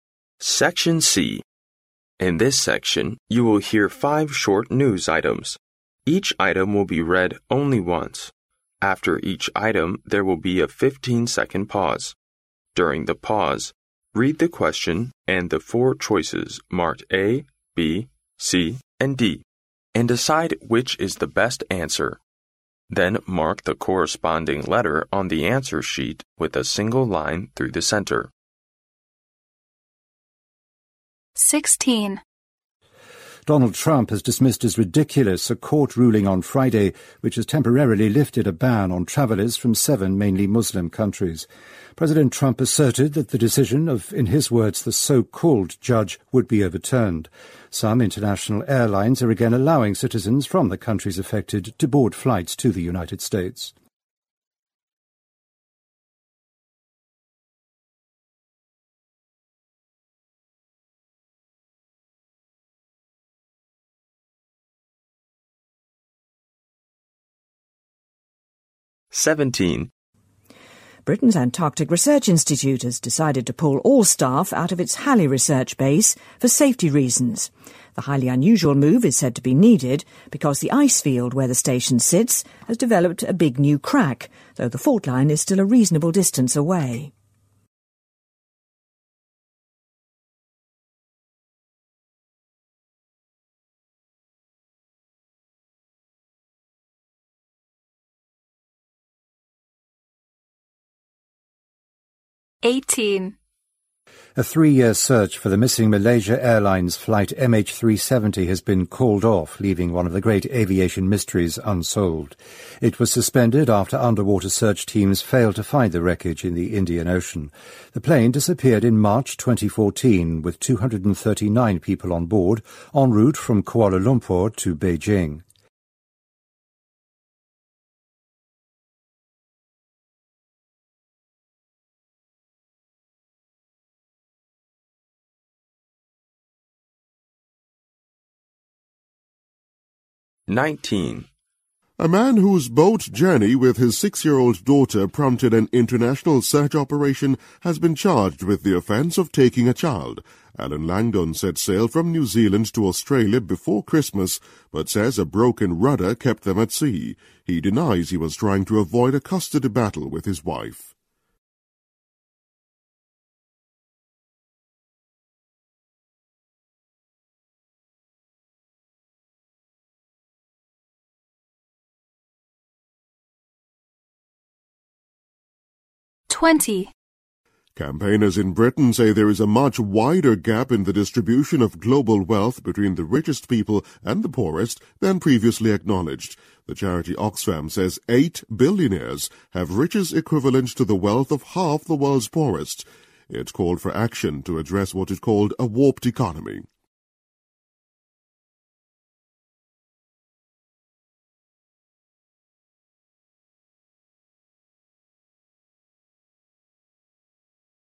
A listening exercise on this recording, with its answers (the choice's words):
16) What was the ruling made by the court?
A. No travelers from seven Muslim countries can enter the USA.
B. The Muslim Ban issued by President Donald Trump was invalid.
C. Airlines must apply for special license for Muslim passengers.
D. The voting in the 2016 presidential election will be investigated.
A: The Muslim Ban issued by President Donald Trump was invalid.

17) Why will Britain's Antarctic Research Institute pull its staff out of its research base?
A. A violent snowstorm is approaching the area.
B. The staff have found a better place for research.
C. Penguins have occupied the base's front line.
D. A big new ice crack has appeared near the base.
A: A big new ice crack has appeared near the base.

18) What can be inferred from the news?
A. The prolonged search for the missing airplane has come to a fruitless end.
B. Some larger pieces of wreckage of the missing airplane have been found.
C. The retrieved black box of the missing airplane may help solve the mystery.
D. Another underwater team will be sent to continue the search next year.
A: The prolonged search for the missing airplane has come to a fruitless end.

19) Why has the man been charged?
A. He conducted sea-sailing without a license.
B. He sailed on the sea with a little child on board.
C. He was found sailing with a broken rudder.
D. He ill-treated his six-year-old daughter.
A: He sailed on the sea with a little child on board.

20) What is a warped economy according to the news?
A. Rich people are getting richer while poor people are getting poorer.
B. Poor people are unable to survive without the help from charity.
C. Eight billionaires own the wealth equivalent to the rest of the world.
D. The gap between the rich and the poor is narrowing gradually.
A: Rich people are getting richer while poor people are getting poorer.

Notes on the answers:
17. 新闻开头提到"Britain's Antarctic Research Institute has decided to pull all staff out of its research base for safety reasons."。后文提到原因是研究站所在的冰面出现了新的大裂缝。因此D项正确。
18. 新闻开头提到"A three-year search for the missing Malaysia Airline's flight MH370 has been called off, leaving one of the great aviation mysteries unsolved."。由此可知,对马航MH370的搜索被取消且没有任何结果。因此A项正确。
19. 新闻开头提到"A man whose boat journey with his six-year-old daughter...has been charged with the offense of taking a child."。后文提到此人进行的是出海活动。由此可知这个人受到的指控是带儿童出海。因此B项正确。